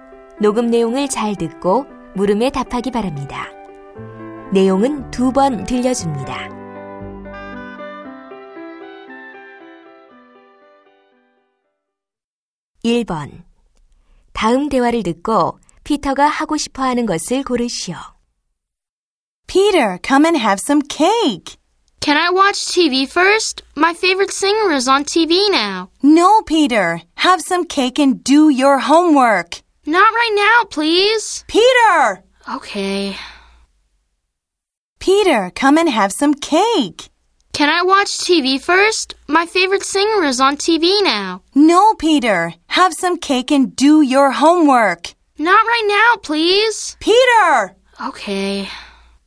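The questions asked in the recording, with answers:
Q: 다음 대화를 듣고 피터가 하고 싶어 하는 것을 고르시오.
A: TV 보기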